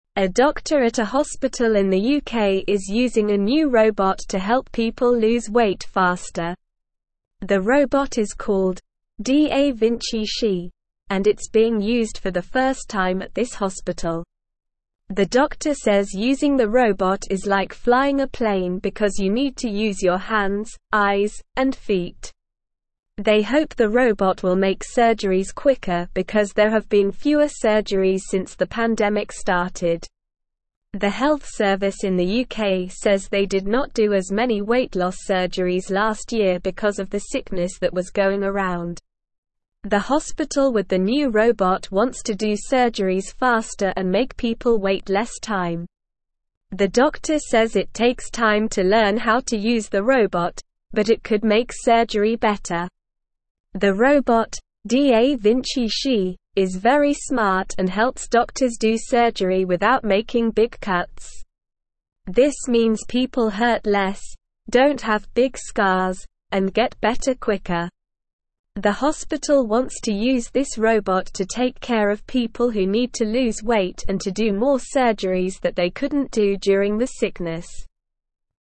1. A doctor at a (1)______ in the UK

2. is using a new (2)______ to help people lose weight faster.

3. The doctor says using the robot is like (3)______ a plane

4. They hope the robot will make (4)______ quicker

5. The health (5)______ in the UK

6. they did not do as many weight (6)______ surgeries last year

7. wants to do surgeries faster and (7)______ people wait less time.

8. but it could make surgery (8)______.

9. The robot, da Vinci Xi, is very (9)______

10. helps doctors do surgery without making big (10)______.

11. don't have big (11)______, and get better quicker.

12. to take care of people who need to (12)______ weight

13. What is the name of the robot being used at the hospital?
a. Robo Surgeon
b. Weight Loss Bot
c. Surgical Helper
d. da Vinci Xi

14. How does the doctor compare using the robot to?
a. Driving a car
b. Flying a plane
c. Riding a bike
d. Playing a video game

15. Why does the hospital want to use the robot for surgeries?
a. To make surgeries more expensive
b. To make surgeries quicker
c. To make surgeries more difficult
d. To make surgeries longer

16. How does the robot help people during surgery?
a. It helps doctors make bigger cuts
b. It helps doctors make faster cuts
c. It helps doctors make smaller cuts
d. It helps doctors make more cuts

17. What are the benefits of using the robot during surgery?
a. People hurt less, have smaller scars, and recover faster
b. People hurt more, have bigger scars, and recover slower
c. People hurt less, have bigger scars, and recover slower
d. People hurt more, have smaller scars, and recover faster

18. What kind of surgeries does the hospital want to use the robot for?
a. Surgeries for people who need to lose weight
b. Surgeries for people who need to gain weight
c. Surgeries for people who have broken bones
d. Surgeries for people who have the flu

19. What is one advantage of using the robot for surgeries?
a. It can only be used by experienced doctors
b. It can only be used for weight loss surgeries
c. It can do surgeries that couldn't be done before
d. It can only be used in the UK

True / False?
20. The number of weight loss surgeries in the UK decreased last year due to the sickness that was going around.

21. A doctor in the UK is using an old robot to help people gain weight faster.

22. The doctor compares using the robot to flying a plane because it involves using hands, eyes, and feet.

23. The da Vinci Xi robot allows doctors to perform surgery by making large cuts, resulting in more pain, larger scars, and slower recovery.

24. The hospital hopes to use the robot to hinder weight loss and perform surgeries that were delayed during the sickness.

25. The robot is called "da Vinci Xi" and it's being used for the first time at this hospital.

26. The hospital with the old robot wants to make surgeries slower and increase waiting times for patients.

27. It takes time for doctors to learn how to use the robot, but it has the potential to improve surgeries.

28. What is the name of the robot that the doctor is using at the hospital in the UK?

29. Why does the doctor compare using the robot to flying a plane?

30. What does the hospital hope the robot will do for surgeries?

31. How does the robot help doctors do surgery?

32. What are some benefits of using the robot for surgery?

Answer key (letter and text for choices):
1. hospital
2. robot
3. flying
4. surgeries
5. service
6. loss
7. make
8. better
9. smart
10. cuts
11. scars
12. lose
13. d. da Vinci Xi
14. b. Flying a plane
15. b. To make surgeries quicker
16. c. It helps doctors make smaller cuts
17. a. People hurt less, have smaller scars, and recover faster
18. a. Surgeries for people who need to lose weight
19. c. It can do surgeries that couldn't be done before
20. True
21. False
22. True
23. False
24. False
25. True
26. False
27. True
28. The robot is called "da Vinci Xi".
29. The doctor compares using the robot to flying a plane because you need to use your hands, eyes, and feet to control it.
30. The hospital hopes the robot will make surgeries quicker and help people wait less time.
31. The robot helps doctors do surgery by allowing them to make smaller cuts, which means less pain, smaller scars, and faster recovery.
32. Some benefits of using the robot for surgery are less pain, smaller scars, and faster recovery for the patients.

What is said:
A doctor at a hospital in the UK is using a new robot to help people lose weight faster. The doctor says using the robot is like flying a plane because you need to use your hands, eyes, and feet. They hope the robot will make surgeries quicker because there have been fewer surgeries since the pandemic started.
The health service in the UK says they did not do as many weight loss surgeries last year because of the sickness that was going around. The hospital with the new robot wants to do surgeries faster and make people wait less time. The doctor says it takes time to learn how to use the robot, but it could make surgery better.
The robot, da Vinci Xi, is very smart and helps doctors do surgery without making big cuts. This means people hurt less, don't have big scars, and get better quicker. The hospital wants to use this robot to take care of people who need to lose weight and to do more surgeries that they couldn't do during the sickness.

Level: Level 2